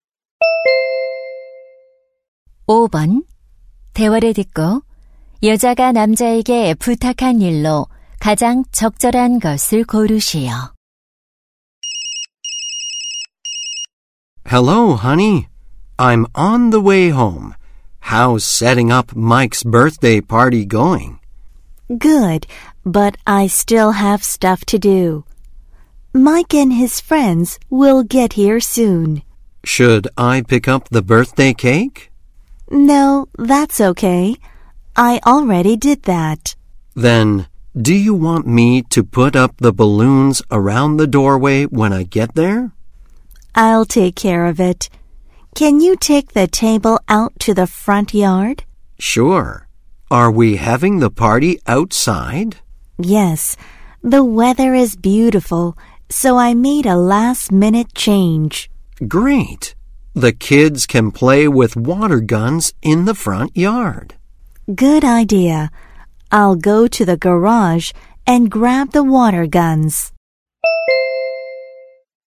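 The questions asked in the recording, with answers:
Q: 대화를 듣고 여자가 남자에게 부탁한 일로 가장 적절한 것을 고르시오.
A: 테이블을 앞마당으로 옮기기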